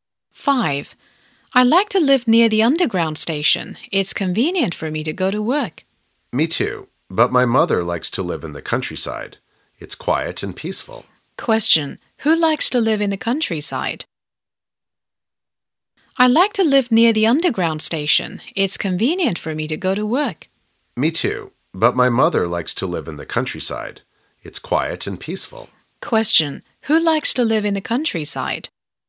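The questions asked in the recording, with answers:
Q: Who likes to live in the countryside?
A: The speaker's mother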